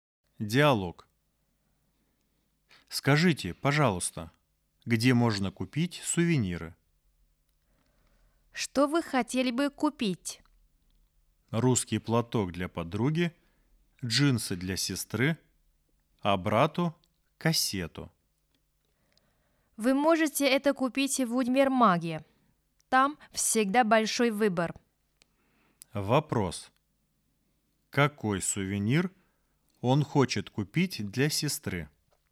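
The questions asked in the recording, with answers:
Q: Какой сувенир он хочет купить для сестры?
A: джинсы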